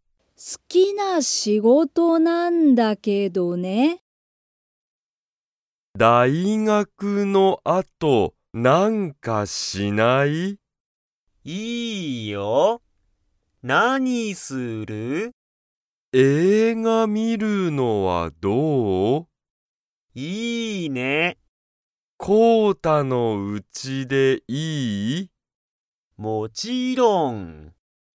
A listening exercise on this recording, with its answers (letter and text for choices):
Comprehension Quiz (Skip if you don't understand the conversation yet)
まさととこうたは、大学(だいがく)の後(あと)、____。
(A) 一緒(いっしょ)に仕事(しごと)する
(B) 映画観(えいがみ)る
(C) まさとのうちに行(い)く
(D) なにもしない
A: (B) 映画観(えいがみ)る

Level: Level 1